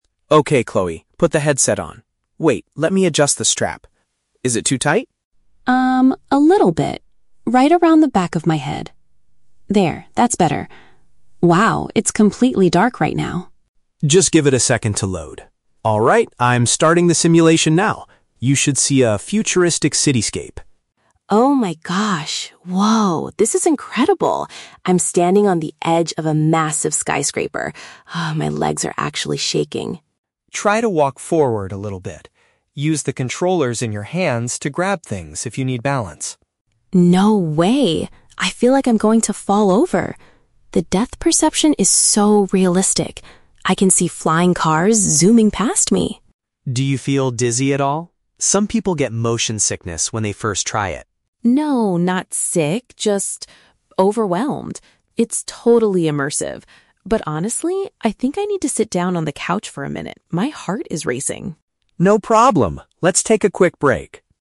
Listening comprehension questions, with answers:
Listen to the conversation between two siblings and choose the correct answer (A, B, or C) for each question.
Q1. What is the first problem Chloe has with the equipment?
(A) The screen is completely broken.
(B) The band is slightly uncomfortable.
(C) The hand controllers do not work.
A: The band is slightly uncomfortable.

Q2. How does Chloe feel when the simulation starts?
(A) She feels physically ill.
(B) She is disappointed by the graphics.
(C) She is extremely thrilled and nervous.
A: She is extremely thrilled and nervous.

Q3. What does Chloe decide to do at the end of the conversation?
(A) Move closer to the edge of the building.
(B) Take a short rest because she is tense.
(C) Play a different virtual reality game.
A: Take a short rest because she is tense.

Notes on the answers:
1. Chloe says the strap is "too tight... around the back of my head". "The band is slightly uncomfortable" is a paraphrase of this.
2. Chloe says her "legs are actually shaking", she is "overwhelmed", and her "heart is racing". Option C (thrilled and nervous) perfectly summarizes these feelings.
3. Chloe says "I think I need to sit down... for a minute". Option B uses synonyms ("take a short rest") to express this idea.

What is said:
Mark: Okay, Chloe, put the headset on. Wait, let me adjust the strap. Is it too tight?
Chloe: Um, a little bit... right around the back of my head. There, that's better. Wow, it's completely dark right now.
Mark: Just give it a second to load. Alright, I'm starting the simulation now. You should see a futuristic cityscape.
Chloe: Oh my gosh... whoa! This is incredible! I'm standing on the edge of a massive skyscraper. Ah, my legs are actually shaking.
Mark: Try to walk forward a little bit. Use the controllers in your hands to grab things if you need balance.
Chloe: No way! I feel like I'm going to fall over. The depth perception is so realistic. I can see flying cars zooming past me.
Mark: Do you feel dizzy at all? Some people get motion sickness when they first try it.
Chloe: No, not sick, just... overwhelmed. It's totally immersive. But honestly, I think I need to sit down on the couch for a minute, my heart is racing.

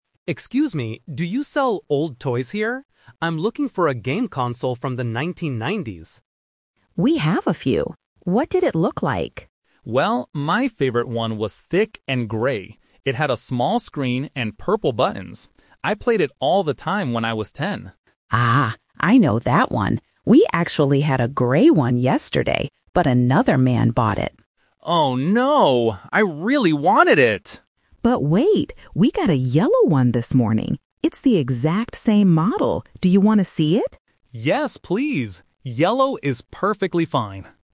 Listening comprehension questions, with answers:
Listen to a customer talking to an assistant in an antique shop. Then, read the questions below and choose the correct answer (A, B, or C) for each question.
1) What did the customer's original game console look like?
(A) It was gray with purple buttons.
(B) It was yellow with a big screen.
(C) It was black and very thin.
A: It was gray with purple buttons.

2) Why can't the customer buy the gray console today?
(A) It is too expensive for him.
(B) Another person already bought it.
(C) The shop does not sell old toys.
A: Another person already bought it.

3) What happens at the end of the conversation?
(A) The customer leaves the shop to go somewhere else.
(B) The customer decides he doesn't want the yellow one.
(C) The assistant shows the customer a yellow console.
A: The assistant shows the customer a yellow console.

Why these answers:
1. The customer clearly describes his old toy: "my favorite one was thick and gray. It had a small screen and purple buttons." Option (B) is a trap; yellow is the color of the new console the shop has today, not the one he had as a kid. Option (C) is a plausible description of modern electronics, but it is not mentioned in the audio.
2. The assistant says about the gray console, "...but another man bought it." Option (A) is a trap; it might be expensive because it is an antique, but price is never mentioned. Option (C) is a trap; the shop does sell old toys, but they just don't have that specific gray one anymore.
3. The assistant says, "We got a yellow one this morning... Do you want to see it?" and the customer agrees. Option (A) is a trap; he says "Oh, no!" when he hears the gray one is gone, but he stays to see the yellow one. Option (B) is a trap; the customer actually says, "Yellow is perfectly fine," meaning he wants it.

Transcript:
Customer: Excuse me, do you sell old toys here? I'm looking for a game console from the 1990s.
Assistant: We have a few. What did it look like?
Customer: Well, my favorite one was thick and gray. It had a small screen and purple buttons. I played it all the time when I was ten.
Assistant: Ah, I know that one. We actually had a gray one yesterday, but another man bought it.
Customer: Oh, no! I really wanted it.
Assistant: But wait! We got a yellow one this morning. It's the exact same model. Do you want to see it?

